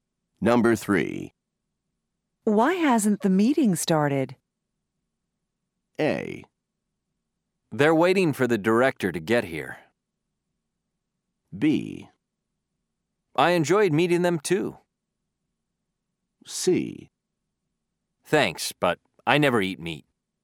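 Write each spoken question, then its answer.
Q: Why hasn't the meeting started?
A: A: They're waiting for the director to get here.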